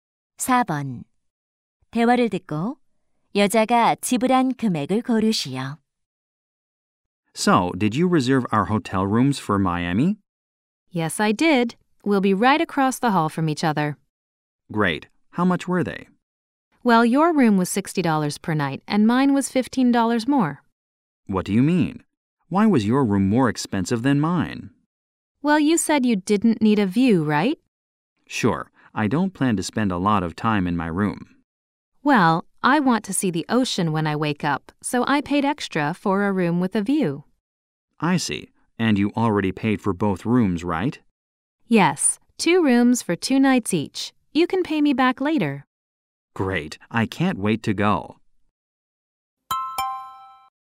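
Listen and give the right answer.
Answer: $270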